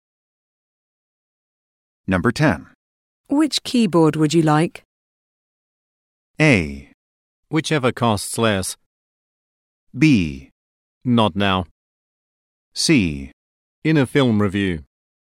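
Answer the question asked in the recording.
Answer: A: Whichever costs less.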